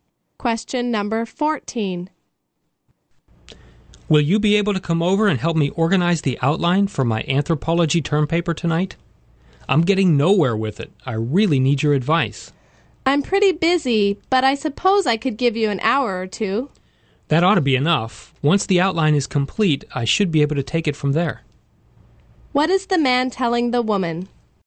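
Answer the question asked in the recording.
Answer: He only needs one or two hours of her help with the outline.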